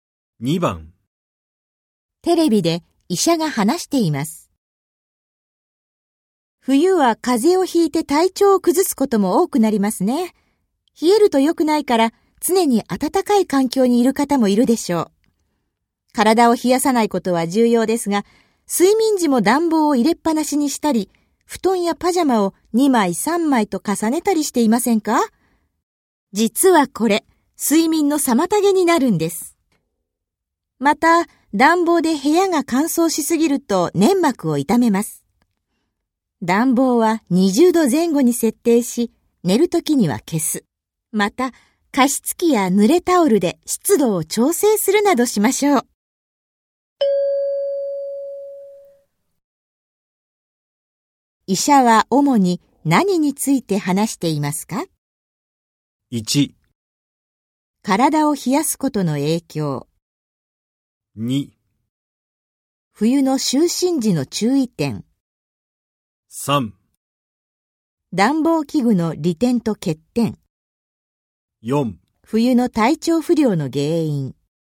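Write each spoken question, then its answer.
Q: 医者は主に何について話していますか?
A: 2: 冬の就寝時の注意点。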